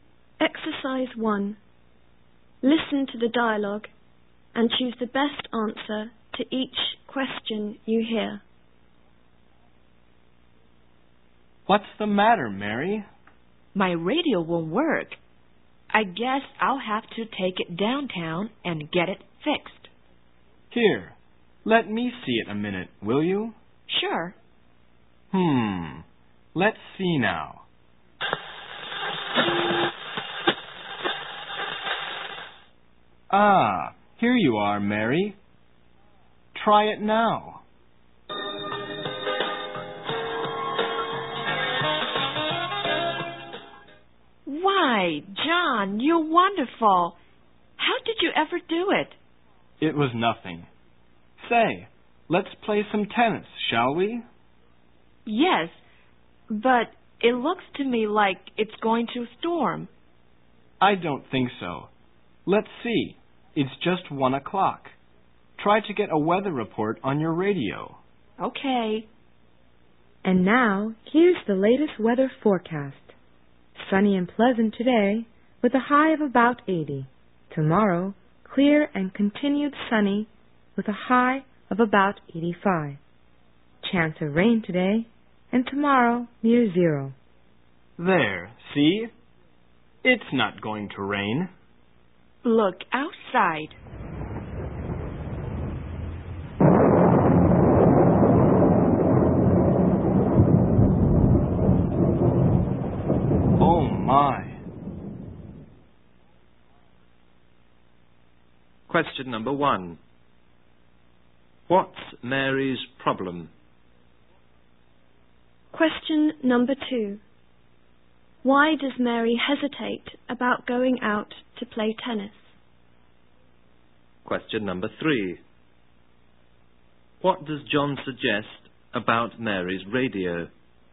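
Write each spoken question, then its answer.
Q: What's Mary's problem?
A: Her radio won't work

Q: Why does Mary hesitate about going out to play tennis?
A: She thinks it's going to storm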